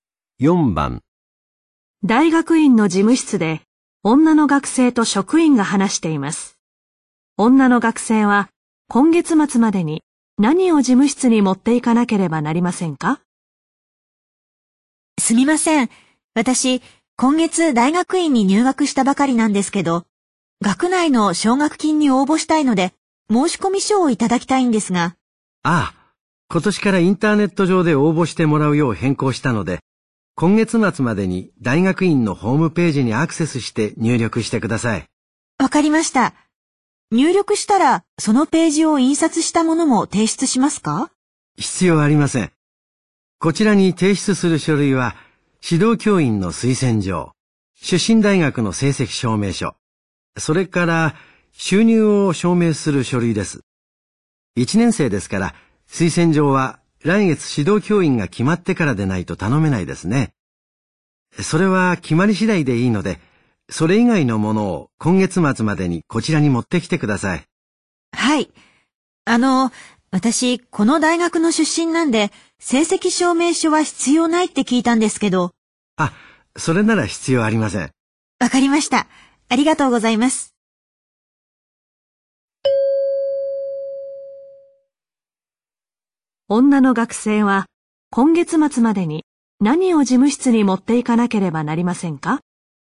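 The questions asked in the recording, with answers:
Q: 女の学生は、今月末までに何を事務室に持っていかなければなりませんか?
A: 収入を証明する書類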